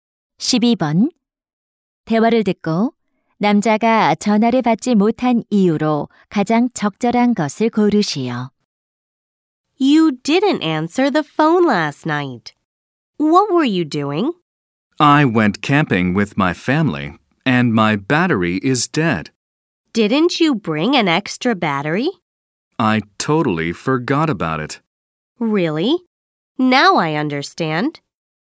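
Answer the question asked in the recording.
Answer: 배터리가 다 닳아서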